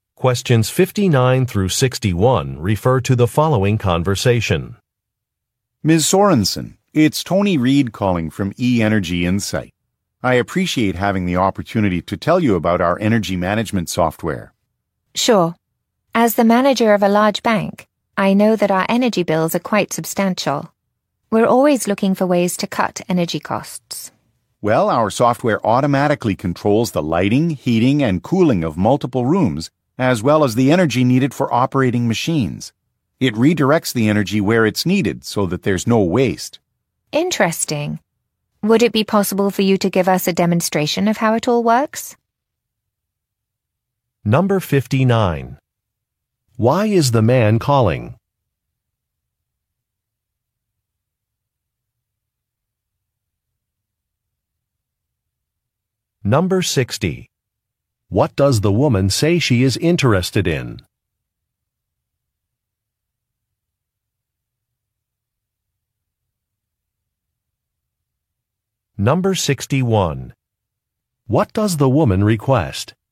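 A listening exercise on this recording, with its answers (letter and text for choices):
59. Why is the man calling?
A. To conduct a survey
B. To inquire about a convention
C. To provide some feedback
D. To promote a product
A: D. To promote a product

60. What does the woman say she is interested in?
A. Making online payments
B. Buying a membership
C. Reducing energy costs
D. Funding a research project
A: C. Reducing energy costs

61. What does the woman request?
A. A demonstration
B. A site visit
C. A registration form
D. A financing plan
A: A. A demonstration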